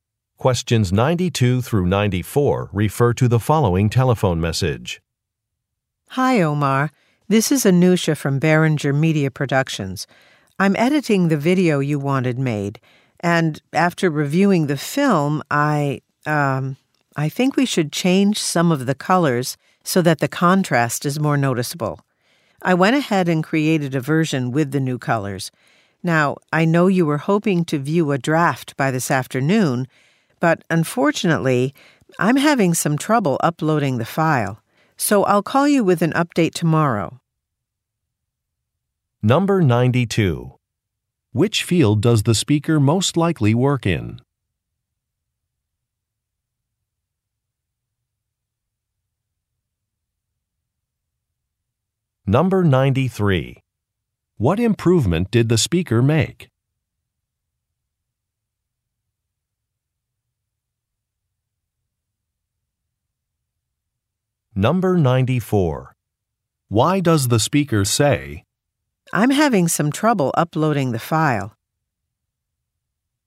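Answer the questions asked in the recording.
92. Video production
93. She changed the colors to make the contrast more noticeable
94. To explain that the draft will not be ready this afternoon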